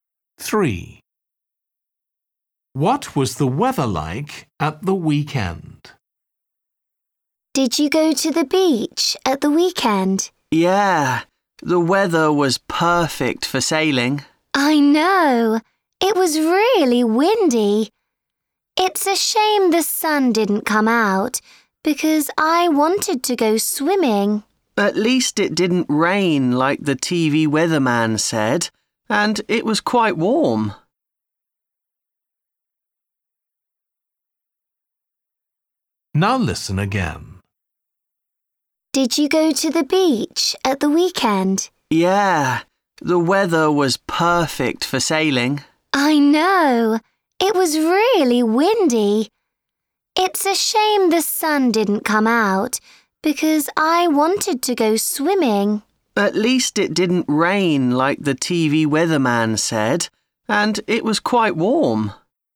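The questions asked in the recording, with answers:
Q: What was the weather like at the weekend?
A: windy, warm and cloudy, with no rain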